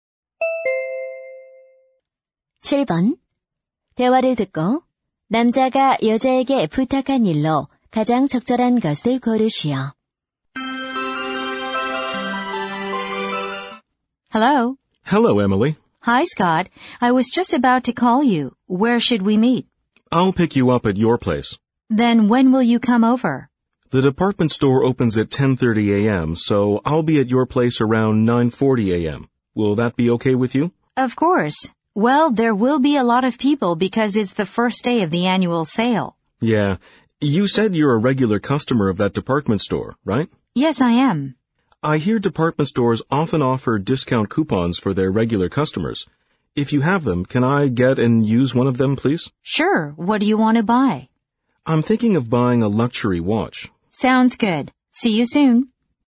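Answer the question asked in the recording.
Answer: 할인 쿠폰 주기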